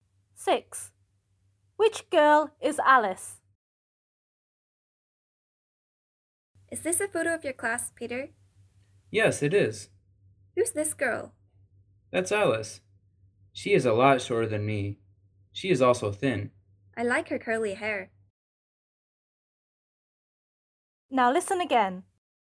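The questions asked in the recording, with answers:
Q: Which girl is Alice?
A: The short, thin girl with curly hair.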